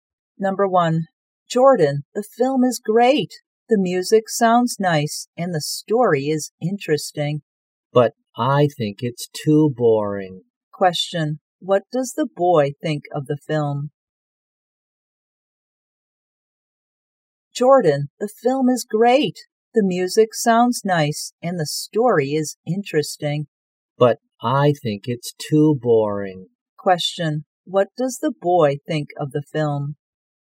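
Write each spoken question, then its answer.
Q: Question, what does the boy think of the film?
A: It's too boring.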